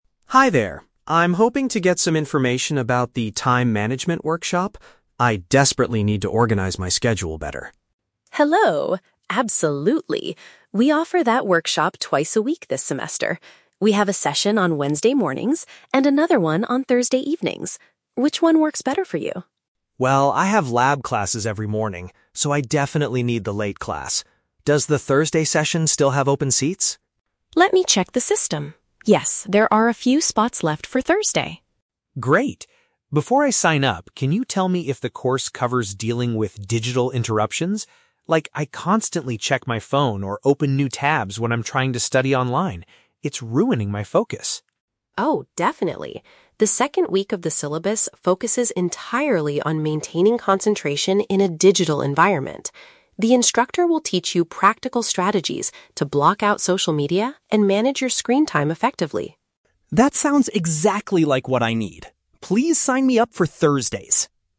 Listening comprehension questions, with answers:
Listen to the conversation between a student and a receptionist, then choose the correct answer (A, B, or C) for each question.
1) Why does Ryan choose the Thursday session?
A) He is busy with other academic commitments earlier in the day.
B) It is the only workshop that still has available seats right now.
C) He strongly prefers studying at night rather than waking up early.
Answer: A) He is busy with other academic commitments earlier in the day.

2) What specific problem is Ryan currently struggling with?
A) He spends too much time chatting with friends at the campus library.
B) He frequently loses his focus due to his electronic devices.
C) He cannot find a quiet physical environment to take his online classes.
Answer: B) He frequently loses his focus due to his electronic devices.

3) What will the workshop teach participants during the second week?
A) How to utilize new social media platforms for academic research.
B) Techniques to create a personalized weekly schedule and planner.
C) Methods to control screen usage and stay concentrated.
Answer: C) Methods to control screen usage and stay concentrated.

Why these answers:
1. Ryan says he needs the late class (Thursday evening) because he has "lab classes every morning." Option A perfectly paraphrases having classes as "academic commitments." Option B is a trap; the receptionist checks for available seats for Thursday, but she never says Wednesday is completely full. Option C is a plausible reason, but it is not mentioned in the audio.
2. Ryan admits he struggles with "digital interruptions" because he constantly checks his phone or opens new tabs. Option B paraphrases this as losing focus due to "electronic devices." Option A is a trap; socializing is a form of distraction, but the library and friends are not mentioned. Option C is not mentioned.
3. Ms. Kelly states the second week focuses on "maintaining concentration" and strategies to "manage your screen time effectively." Option C perfectly paraphrases this. Option A is a trap; the course teaches you how to "block out" social media, not how to utilize it for studying. Option B is a trap; creating a schedule is a general time management skill, but it is not what is taught during the second week about digital environments.

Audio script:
Ryan: Hi there. I'm hoping to get some information about the Time Management workshop? I desperately need to organize my schedule better.
Kelly: Hello! Absolutely. We offer that workshop twice a week this semester. We have a session on Wednesday mornings, and another one on Thursday evenings. Which one works better for you?
Ryan: Well, I have lab classes every morning, so I definitely need the late class. Does the Thursday session still have open seats?
Kelly: Let me check the system... Yes, there are a few spots left for Thursday.
Ryan: Great. Before I sign up, can you tell me if the course covers dealing with digital interruptions? Like, I constantly check my phone or open new tabs when I'm trying to study online. It's ruining my focus.
Kelly: Oh, definitely. The second week of the syllabus focuses entirely on maintaining concentration in a digital environment. The instructor will teach you practical strategies to block out social media and manage your screen time effectively.
Ryan: That sounds exactly like what I need. Please sign me up for Thursdays!

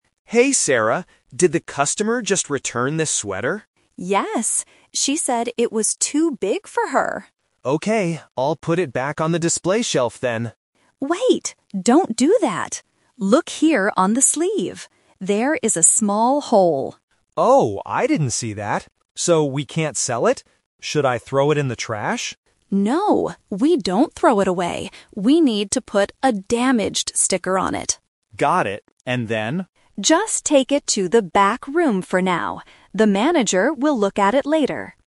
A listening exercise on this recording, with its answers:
Listen to the conversation between two salespeople. Read the questions and choose the correct answer (A, B, or C).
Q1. Where did Alex plan to put the sweater at first?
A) In the back room.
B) On the display shelf.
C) In the trash.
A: B) On the display shelf.

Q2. What is the actual problem with the sweater?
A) It is the wrong color.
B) It is too big.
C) It has a small hole.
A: C) It has a small hole.

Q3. What will the salespeople do with the sweater now?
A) Put a sticker on it and take it to the back room.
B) Throw it in the trash immediately.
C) Give it to the store manager to wear.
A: A) Put a sticker on it and take it to the back room.

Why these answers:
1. This is the "Twist". Alex originally says, "I'll put it back on the display shelf then," but Sarah stops him. Why the trap is wrong: Options (A) and (C) are traps. The back room is the final destination, not the first plan. The trash is an idea Alex suggests later, but it is rejected.
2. Sarah points out the real issue: "Look here on the sleeve. There is a small hole." Why the trap is wrong: Option (B) is a major trap. The customer said it was too big, but the real reason they cannot sell it is the hole. Option (A) is not mentioned.
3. Sarah instructs Alex to "put a 'Damaged' sticker on it" and "take it to the back room." Why the trap is wrong: Option (B) is a trap because Alex asks, "Should I throw it in the trash?" but Sarah says "No." Option (C) uses the word "manager" from the audio, but the manager will "look at it", not wear it.

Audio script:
Alex: Hey, Sarah. Did the customer just return this sweater?
Sarah: Yes. She said it was too big for her.
Alex: Okay, I'll put it back on the display shelf then.
Sarah: Wait, don't do that. Look here on the sleeve. There is a small hole.
Alex: Oh, I didn't see that! So, we can't sell it. Should I throw it in the trash?
Sarah: No, we don't throw it away. We need to put a "Damaged" sticker on it.
Alex: Got it. And then?

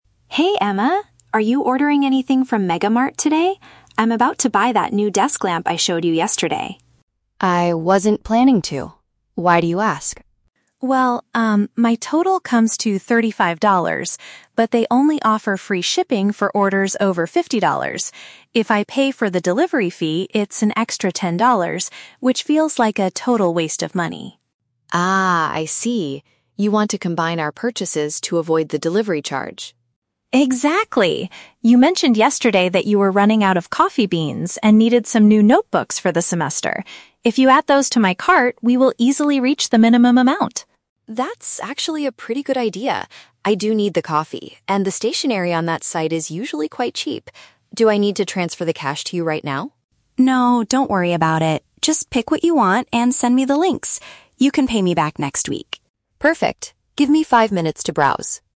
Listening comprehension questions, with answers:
Listen to a conversation between two roommates about online shopping. Choose the best answer (A, B, or C) for each question.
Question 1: What is Lily trying to achieve by speaking with Emma?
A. She wants to borrow ten dollars to pay for the shipping fee.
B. She wants her roommate to help her reach the minimum spending requirement.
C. She wants to recommend a new online shopping application to Emma.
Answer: B. She wants her roommate to help her reach the minimum spending requirement.

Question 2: According to Lily, what does Emma currently need to buy?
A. A new desk lamp for the upcoming semester.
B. Some fresh vegetables to cook dinner tonight.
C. Some office supplies and something to drink.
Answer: C. Some office supplies and something to drink.

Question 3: How will the payment be handled between the two friends?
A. Lily will pay for everything now and Emma will return the money later.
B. Emma will send the money to Lily before the order is officially placed.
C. They will split the extra delivery charge equally between them.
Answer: A. Lily will pay for everything now and Emma will return the money later.

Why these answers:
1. Lily suggests that if Emma adds her items to the cart, they will "reach the minimum amount" to avoid the delivery charge. Option B paraphrases this as helping her "reach the minimum spending requirement."
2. Lily reminds Emma that she needed "coffee beans" and "new notebooks." Option C uses synonyms: "something to drink" (coffee beans) and "office supplies" (notebooks/stationery).
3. Lily tells Emma "don't worry about it" when asked about transferring money right now, and adds, "You can pay me back next week." Option A paraphrases this arrangement perfectly.

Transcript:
Lily: Hey Emma, are you ordering anything from MegaMart today? I'm about to buy that new desk lamp I showed you yesterday.
Emma: I wasn't planning to. Why do you ask?
Lily: Well, um, my total comes to $35, but they only offer free shipping for orders over $50. If I pay for the delivery fee, it's an extra $10, which feels like a total waste of money.
Emma: Ah, I see. You want to combine our purchases to avoid the delivery charge.
Lily: Exactly! You mentioned yesterday that you were running out of coffee beans and needed some new notebooks for the semester. If you add those to my cart, we will easily reach the minimum amount.
Emma: That's actually a pretty good idea. I do need the coffee, and the stationery on that site is usually quite cheap. Do I need to transfer the cash to you right now?
Lily: No, don't worry about it. Just pick what you want and send me the links. You can pay me back next week.

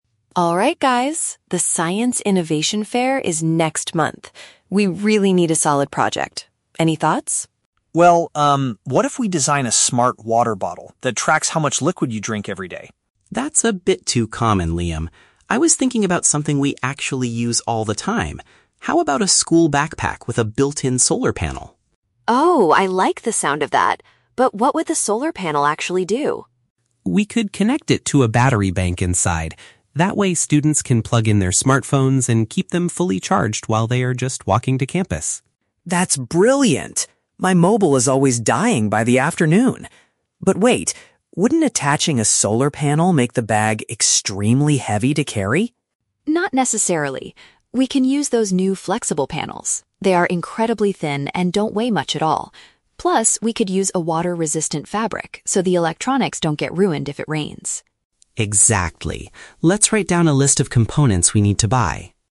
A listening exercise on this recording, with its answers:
Listen to three students discussing a school project. For each question, choose the correct answer (A, B, or C).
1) What was Liam's initial suggestion for the science competition?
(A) An intelligent drinking container.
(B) A new type of mobile battery.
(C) A waterproof jacket for students.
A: (A) An intelligent drinking container.

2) What is the primary purpose of the solar backpack they want to create?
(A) To help students carry heavy textbooks more easily.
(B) To provide electrical power for mobile devices.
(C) To measure the exact distance students walk to campus.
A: (B) To provide electrical power for mobile devices.

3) How does Emma suggest they solve the problem of the bag's weight?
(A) By removing the internal power bank from the design.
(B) By asking students to carry fewer items in their bags.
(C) By using a specific type of lightweight technology.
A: (C) By using a specific type of lightweight technology.

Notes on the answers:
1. Liam suggests a "smart water bottle." Option (A) is a direct paraphrase ("intelligent" for "smart", "drinking container" for "water bottle"). Option (B) is a trap; they discuss charging mobile batteries later, but it wasn't Liam's initial idea. Option (C) is a trap; Emma mentions "water-resistant fabric" for the backpack, not a jacket.
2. Noah explains that students can "plug in their smartphones and keep them fully charged." Option (B) summarizes this using synonyms ("electrical power for mobile devices"). Option (A) is not mentioned. Option (C) is a trap; they mention "walking to campus" as the time when the bag charges the phone, not that the bag measures the distance.
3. When Liam worries the bag will be "extremely heavy", Emma suggests using "flexible panels" that "don't weigh much at all." Option (C) paraphrases this as "lightweight technology". Option (A) is a trap; the battery bank is mentioned by Noah, but Emma never suggests removing it. Option (B) is completely made up and not in the audio.

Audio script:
Emma: Alright guys, the Science Innovation Fair is next month. We really need a solid project. Any thoughts?
Liam: Well, um, what if we design a smart water bottle that tracks how much liquid you drink every day?
Noah: That's a bit too common, Liam. I was thinking about something we actually use all the time. How about a school backpack with a built-in solar panel?
Emma: Oh, I like the sound of that! But what would the solar panel actually do?
Noah: We could connect it to a battery bank inside. That way, students can plug in their smartphones and keep them fully charged while they are just walking to campus.
Liam: That's brilliant. My mobile is always dying by the afternoon. But wait... wouldn't attaching a solar panel make the bag extremely heavy to carry?
Emma: Not necessarily. We can use those new flexible panels. They are incredibly thin and don't weigh much at all. Plus, we could use a water-resistant fabric so the electronics don't get ruined if it rains.

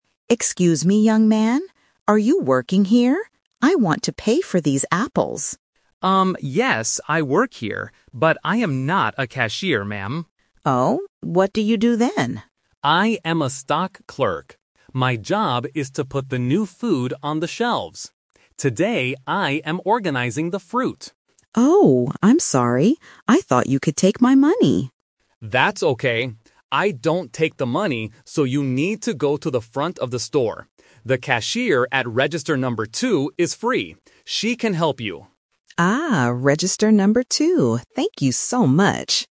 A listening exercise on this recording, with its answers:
Listen to the conversation in a supermarket. Circle the correct answer (A, B, or C).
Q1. What does Mrs. Higgins want to do?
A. Ask for a job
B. Pay for her food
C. Find the fruit shelves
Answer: B. Pay for her food

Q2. What is Jake's job at the supermarket?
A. He is a cashier.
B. He cleans the floors.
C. He puts food on the shelves.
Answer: C. He puts food on the shelves.

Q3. Who can take Mrs. Higgins' money?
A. The stock clerk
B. The cashier at register number 2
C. The manager at the front of the store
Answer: B. The cashier at register number 2

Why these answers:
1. Mrs. Higgins says, "I want to pay for these apples." Option (A) is a plausible guess for a conversation about jobs, but it is not true. Option (C) is a trap because the audio mentions "fruit" and "shelves", but she already has the apples and just wants to pay.
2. Jake says, "My job is to put the new food on the shelves." Option (A) is the trap: Mrs. Higgins thought he was a cashier, but he explicitly says, "But I am not a cashier." Option (B) is a common supermarket job, but it is not mentioned in the audio.
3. Jake tells her, "The cashier at register number 2 is free. She can help you." Option (A) is the trap: Jake is the stock clerk, and he says he doesn't take the money. Option (C) is a trap using the location "the front of the store", but the manager is not mentioned.

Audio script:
Higgins: Excuse me, young man. Are you working here? I want to pay for these apples.
Jake: Um, yes, I work here. But I am not a cashier, ma'am.
Mrs. Higgins: Oh? What do you do then?
Jake: I am a stock clerk. My job is to put the new food on the shelves. Today, I am organizing the fruit.
Mrs. Higgins: Oh, I'm sorry! I thought you could take my money.
Jake: That's okay! I don't take the money, so you need to go to the front of the store. The cashier at register number 2 is free.

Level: A2

